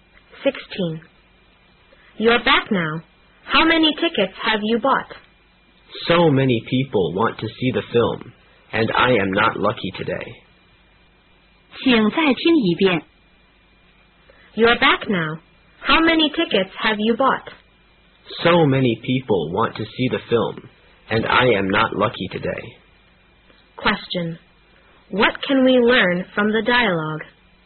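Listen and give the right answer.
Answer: The speaker didn't get any tickets.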